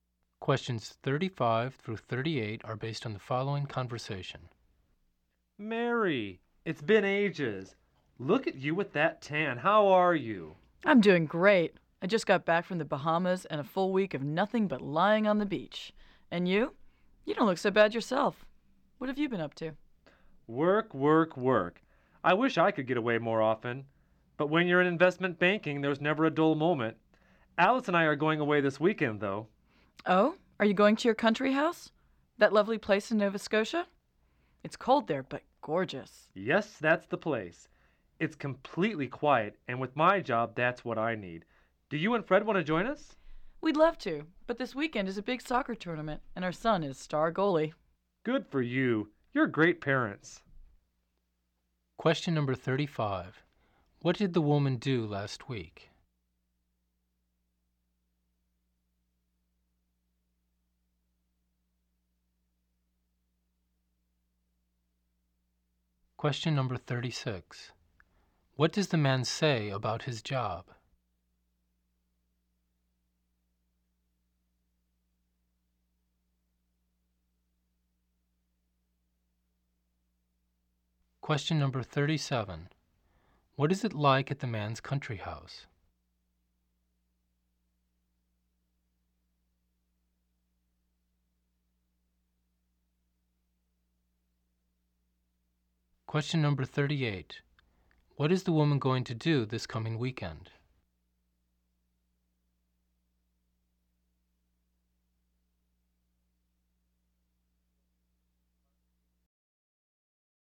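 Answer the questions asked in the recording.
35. She lay on the beach in the Bahamas
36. It is very busy; there's never a dull moment
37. Cold but gorgeous and completely quiet
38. Go to her son's soccer tournament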